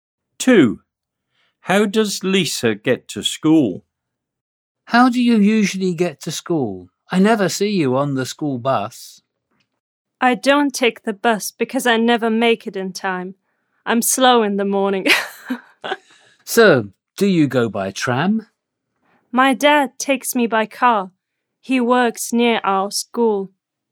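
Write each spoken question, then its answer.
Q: How does Lisa get to school?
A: By car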